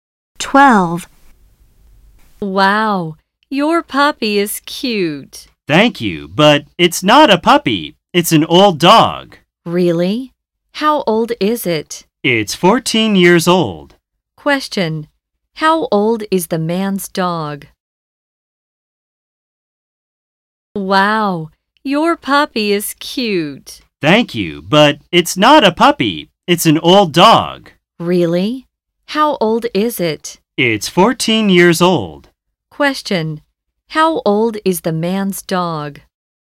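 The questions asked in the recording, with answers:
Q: How old is the man's dog?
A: 14 years old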